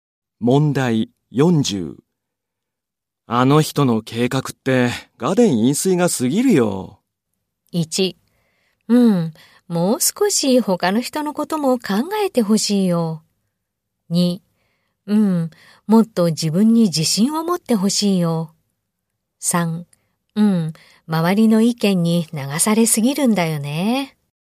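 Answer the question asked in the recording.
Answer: 1: うん。もう少し他の人のことも考えてほしいよ。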